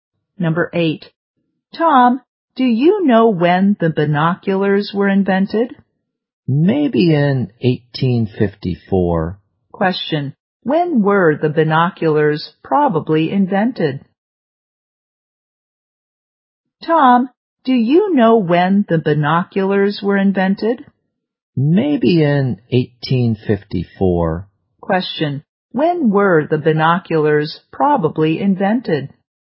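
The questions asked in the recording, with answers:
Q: When were the binoculars probably invented?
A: In 1854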